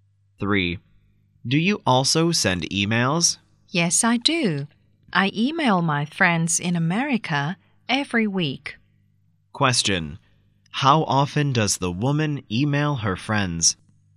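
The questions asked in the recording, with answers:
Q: How often does the woman email her friends?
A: Every week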